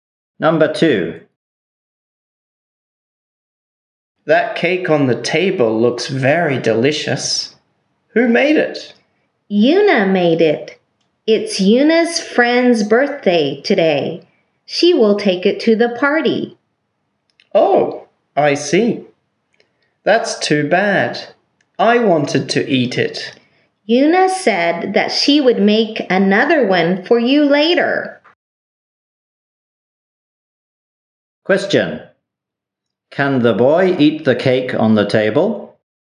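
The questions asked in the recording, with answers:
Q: Can the boy eat the cake on the table?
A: No, but Yuna will make another one for him later.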